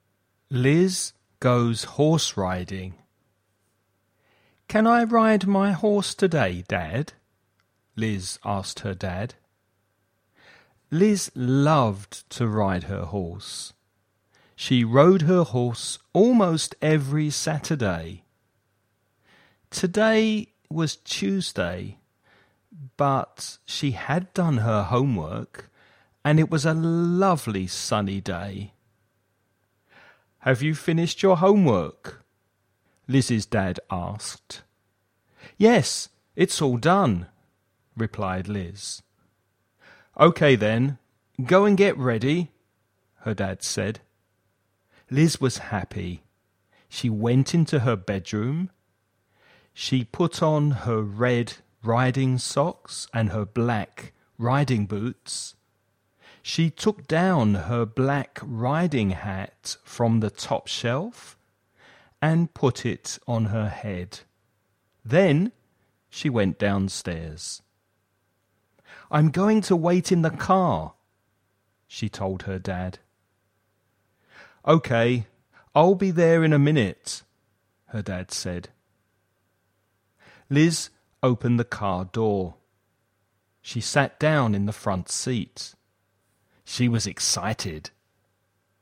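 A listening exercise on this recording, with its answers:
Escucha el audio y completa el ejercicio.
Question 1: When does Liz usually go riding?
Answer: Almost every Saturday

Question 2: What day is it today?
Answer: Tuesday

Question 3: What did Liz's dad ask her?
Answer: If she had finished her homework

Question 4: What colour are Liz's riding boots and hat?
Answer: Black

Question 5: Where was Liz waiting for her dad?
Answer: In the car

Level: nivel básico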